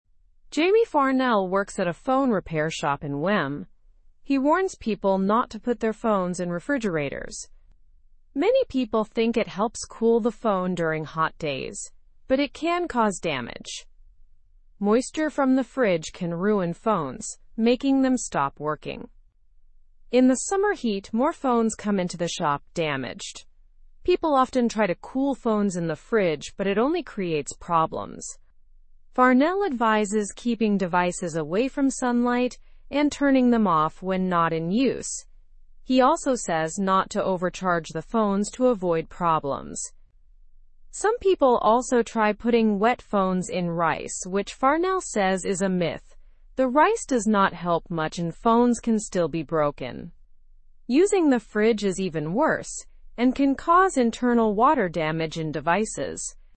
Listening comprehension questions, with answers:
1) Where does Jamie Farnell work?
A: He works at a phone repair shop in Wem.

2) What does Jamie Farnell warn against?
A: He warns against putting phones in refrigerators.

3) What is a common misconception about cooling phones?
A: People think the refrigerator can cool the phone, but it can cause damage.

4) Why is summer a busy time for phone repairs?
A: More phones get damaged by heat and people's attempts to cool them down improperly.

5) What does Farnell advise to avoid phone damage?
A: He advises keeping devices out of sunlight and not overcharging them.

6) Is putting wet phones in rice helpful?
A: No, Farnell says it is a myth and doesn't help much.

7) What can happen when phones are put in fridges?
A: They can suffer internal water damage from the moisture.

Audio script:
Jamie Farnell works at a phone repair shop in Wem. He warns people not to put their phones in refrigerators. Many people think it helps cool the phone during hot days, but it can cause damage. Moisture from the fridge can ruin phones, making them stop working.
In the summer heat, more phones come into the shop damaged. People often try to cool phones in the fridge but it only creates problems. Farnell advises keeping devices away from sunlight and turning them off when not in use. He also says not to overcharge the phones to avoid problems.
Some people also try putting wet phones in rice, which Farnell says is a myth. The rice does not help much and phones can still be broken. Using the fridge is even worse and can cause internal water damage in devices.

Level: (Level 2)